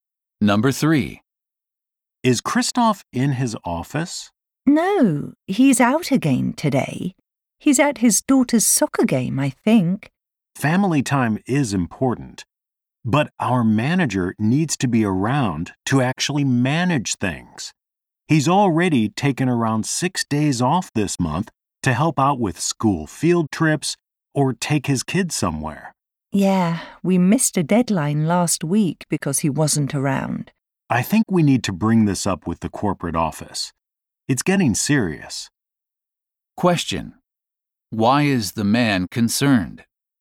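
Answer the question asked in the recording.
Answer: Their manager is often absent, and they missed a deadline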